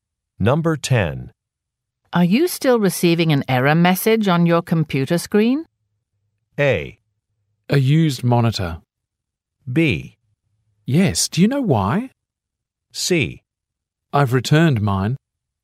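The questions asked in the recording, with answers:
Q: Are you still receiving an error message on your computer screen?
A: B: Yes, do you know why?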